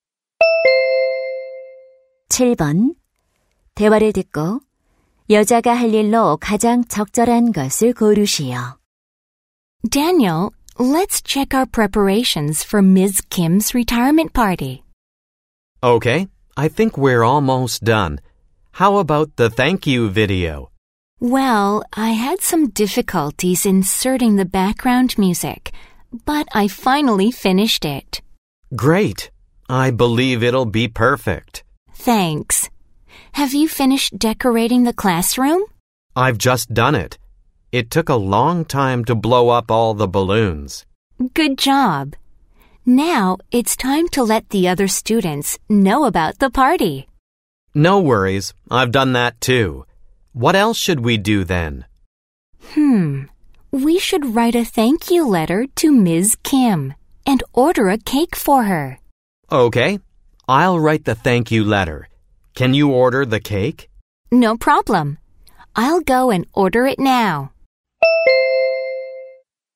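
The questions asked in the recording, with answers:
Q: 대화를 듣고 여자가 할 일로 가장 적절한 것을 고르시오.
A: 케이크 주문하기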